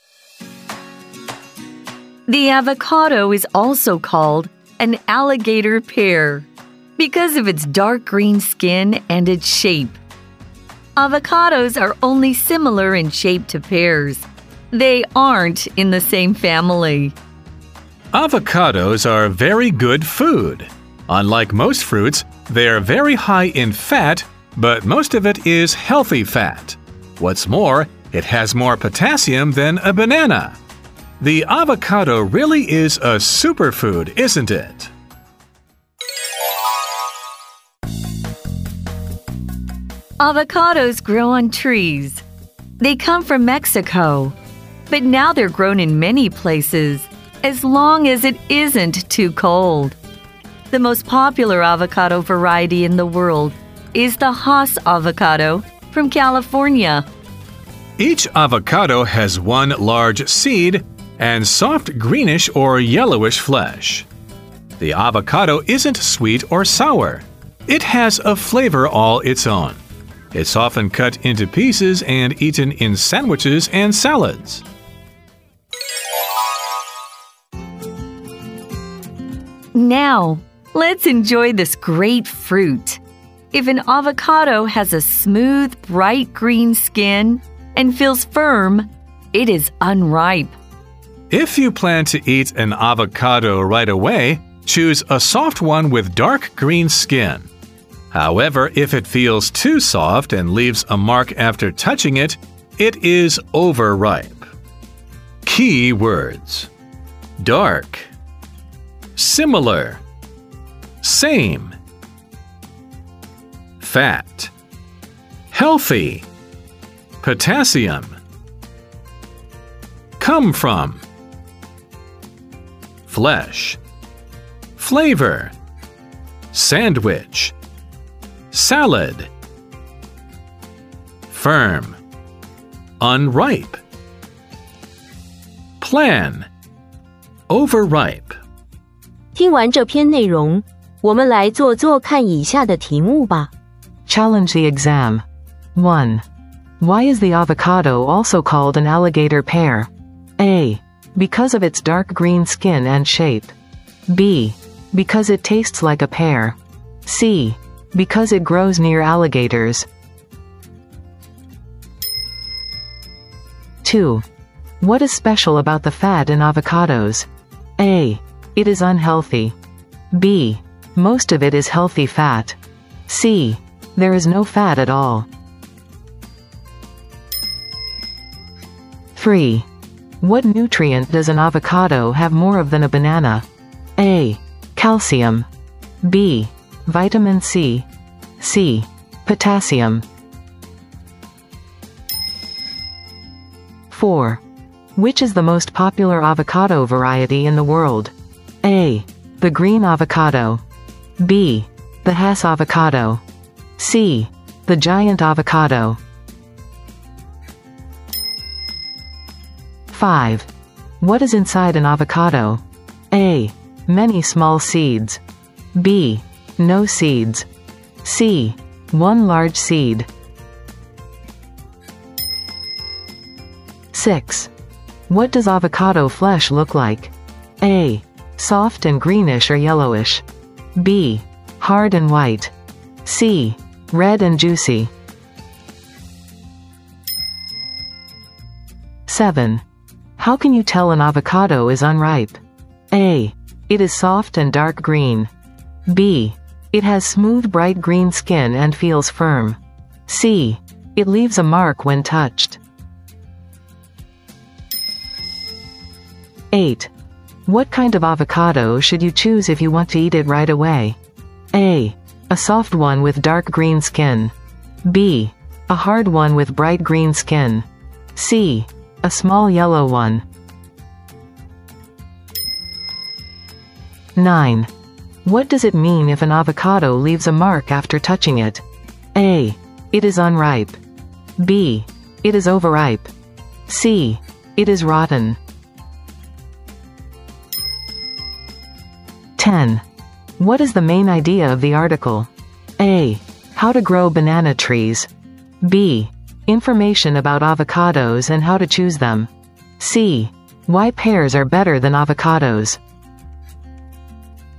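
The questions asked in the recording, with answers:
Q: Why is the avocado also called an alligator pear?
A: A: Because of its dark green skin and shape.

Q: What is special about the fat in avocados?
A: B: Most of it is healthy fat.

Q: What nutrient does an avocado have more of than a banana?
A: C: Potassium.

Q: Which is the most popular avocado variety in the world?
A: B: The Hass avocado.

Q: What is inside an avocado?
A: C: One large seed.

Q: What does avocado flesh look like?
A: A: Soft and greenish or yellowish.

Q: How can you tell an avocado is unripe?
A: B: It has smooth bright green skin and feels firm.

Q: What kind of avocado should you choose if you want to eat it right away?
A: A: A soft one with dark green skin.

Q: What does it mean if an avocado leaves a mark after touching it?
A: B: It is overripe.

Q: What is the main idea of the article?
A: B: Information about avocados and how to choose them.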